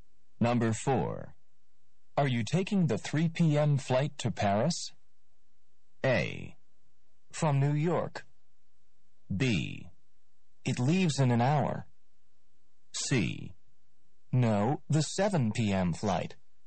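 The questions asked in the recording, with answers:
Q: Are you taking the 3 p.m. flight to Paris?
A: C: No, the 7 p.m. flight.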